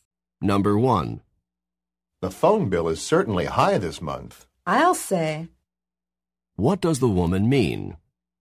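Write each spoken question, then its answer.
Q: What does the woman mean?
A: She agrees the phone bill is high.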